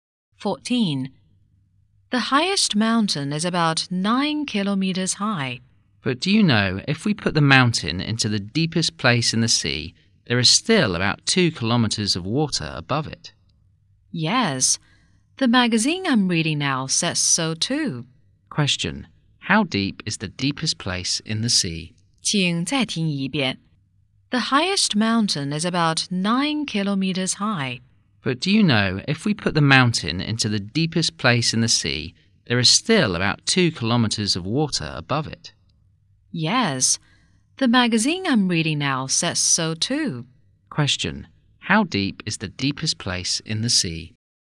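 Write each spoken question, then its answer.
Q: How deep is the deepest place in the sea?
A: About 11 kilometers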